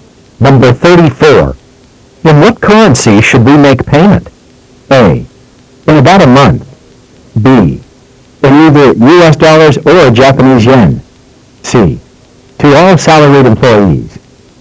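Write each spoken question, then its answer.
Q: In what currency should we make payment?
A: B: In either US dollars or Japanese yen.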